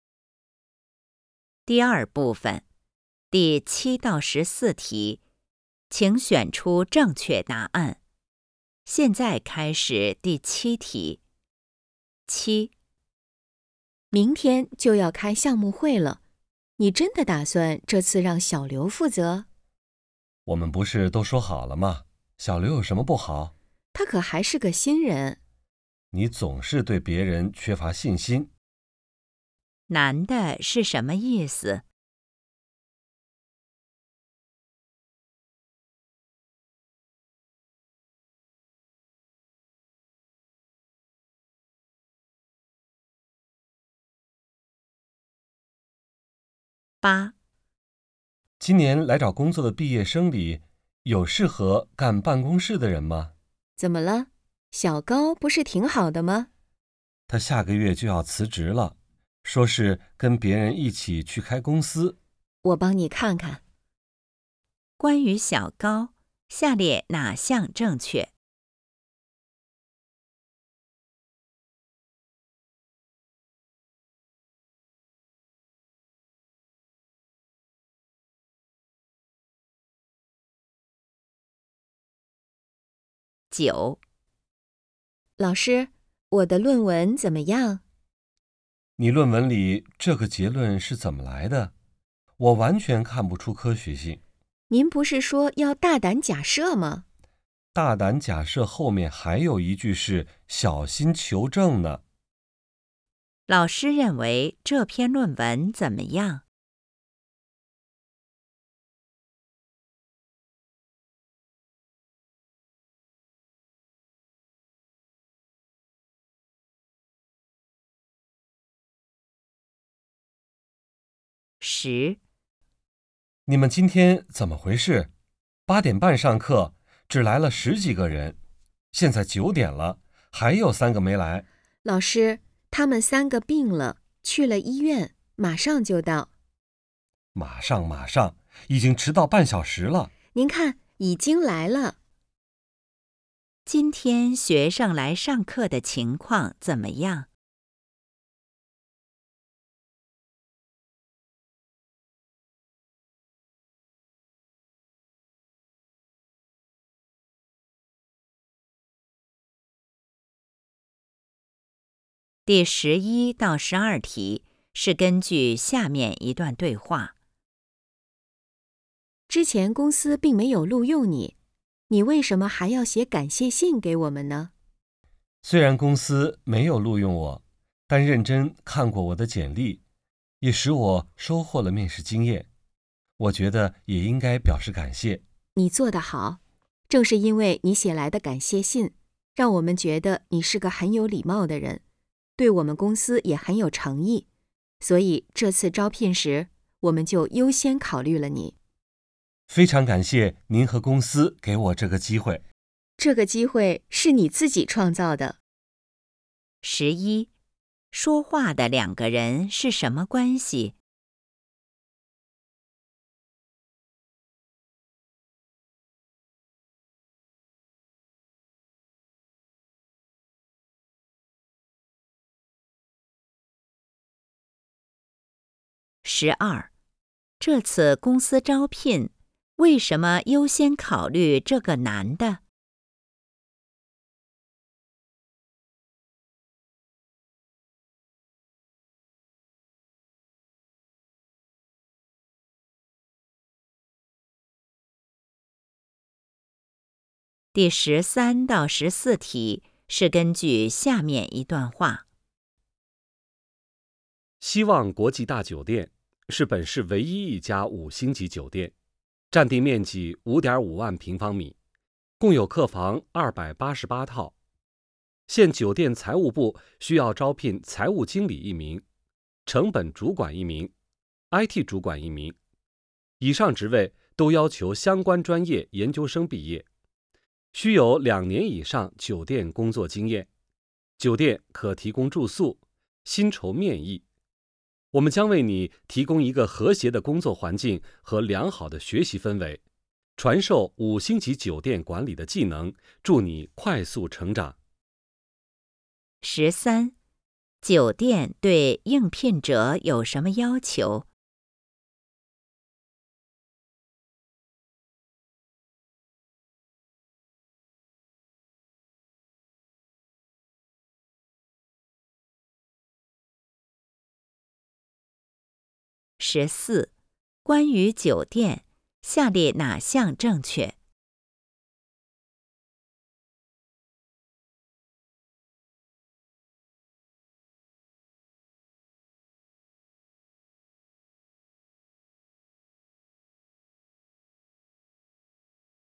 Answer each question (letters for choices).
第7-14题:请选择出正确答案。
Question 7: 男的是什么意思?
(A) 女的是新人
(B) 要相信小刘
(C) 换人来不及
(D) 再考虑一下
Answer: B

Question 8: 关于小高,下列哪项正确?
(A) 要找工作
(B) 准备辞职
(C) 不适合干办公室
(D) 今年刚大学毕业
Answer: B

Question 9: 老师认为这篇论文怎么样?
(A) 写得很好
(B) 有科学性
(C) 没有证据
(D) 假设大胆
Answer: C

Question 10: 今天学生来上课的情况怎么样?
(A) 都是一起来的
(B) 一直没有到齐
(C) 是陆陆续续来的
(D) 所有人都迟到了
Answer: C

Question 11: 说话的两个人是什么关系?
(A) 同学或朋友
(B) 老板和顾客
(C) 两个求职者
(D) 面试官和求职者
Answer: D

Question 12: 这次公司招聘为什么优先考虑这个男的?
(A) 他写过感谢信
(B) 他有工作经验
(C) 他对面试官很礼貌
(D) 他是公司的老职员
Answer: A

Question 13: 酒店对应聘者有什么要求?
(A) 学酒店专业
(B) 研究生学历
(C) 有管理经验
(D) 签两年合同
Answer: B

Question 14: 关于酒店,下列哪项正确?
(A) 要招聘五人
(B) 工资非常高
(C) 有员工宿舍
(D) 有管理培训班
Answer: C

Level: HSK 5